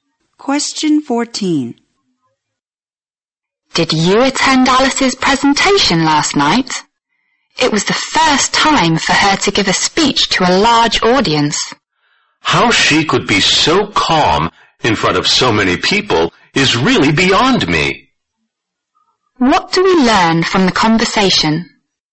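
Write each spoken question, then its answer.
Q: What do we learn from the conversation?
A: Alice was surprisingly calm giving her first speech to a large audience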